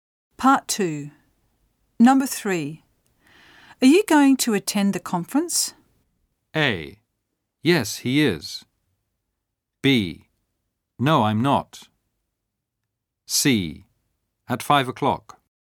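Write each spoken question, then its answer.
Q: Are you going to attend the conference?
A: B: No, I'm not.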